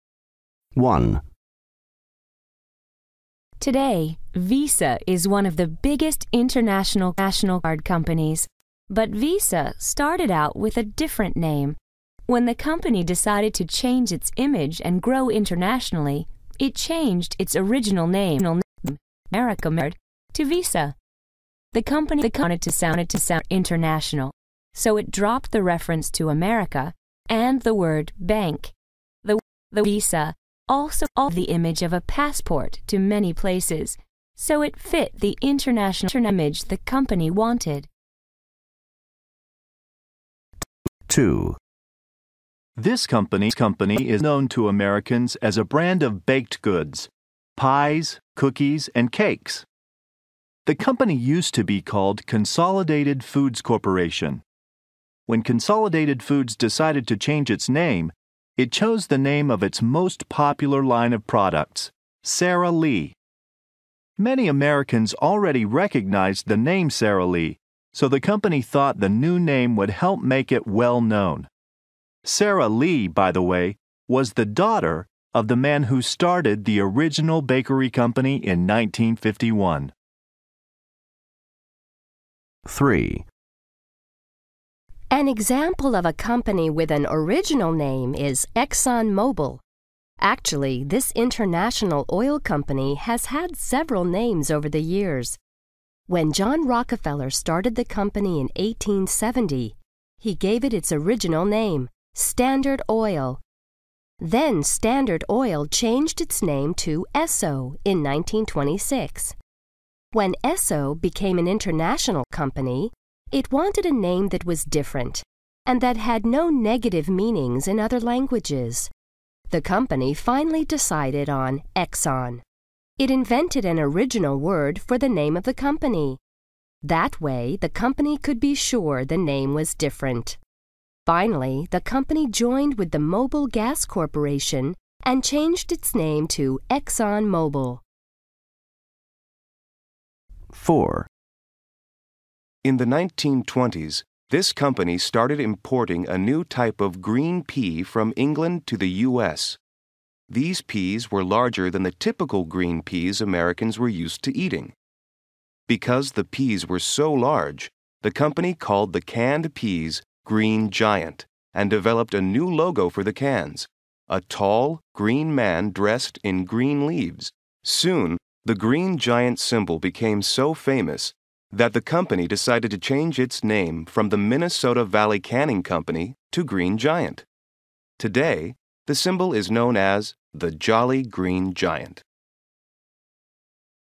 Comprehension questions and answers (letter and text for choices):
B Listen again. Why did the companies change their names? Circle the correct answers.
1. The company wanted to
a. offer passport services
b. become international.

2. The company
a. began making baked goods.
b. wanted a well-known name.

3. The company wanted a name that was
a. original and different.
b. similar to its original name.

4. The company was named for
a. a type of vegetable.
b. the King of England.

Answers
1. b. become international.
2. b. wanted a well-known name.
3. a. original and different.
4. a. a type of vegetable.

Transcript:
1
Woman: Today, VISA is one of the biggest international credit card companies. But VISA started out with a different name. When the company decided to change its image and grow internationally, it changed its original name, Bank Americard, to VISA. The company wanted to sound more international, so it dropped the reference to "America" and the word bank. The work visa also gave the image of a passport to many places, so it fit the international image the company wanted.
2
Man: This company is well known to Americans as a brand of baked goods – pies, cookies, and cakes. The company used to be called Consolidated Foods Corporation. When Consolidated Foods decided to change its name, it chose the name of its most popular line of products: Sara Lee. Many Americans already recognized the name Sara Lee, so the company thought the new name would help make it well known. Sara Lee, by the way, was the daughter of the man who started the original bakery company in nineteen fifty-one.
3
Woman: An example of a company with an original name is ExxonMobil. Actually, this international oil company has had several names over the years. When John Rockefeller started the company in eighteen seventy, he gave it its original name: Standard Oil. Then Standard Oil changed its name to Esso in nineteen twenty-six. When Esso became an international company, it wanted a name that was different and that had no negative meanings in other languages. The company finally decided on Exxon. It invented an original word for the name of the company. That way the company could be sure the name was different. Finally, the company joined with the Mobil Gas Corporation and changed its name to ExxonMobil.
4
Man: In the nineteen twenties, this company started importing a new type of green pea from England to the U.S. These peas were larger than the typical green peas Americans were used to eating. Because the peas were so large, the company called the canned peas "green giant" and developed a new logo for the cans: a tall, green man dressed in green leaves. Soon the green giant symbol became so famous that the company decided to change its name from the Minnesota Valley Canning Company to Green Giant. Today the symbol is known as the Jolly Green Giant.

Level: B2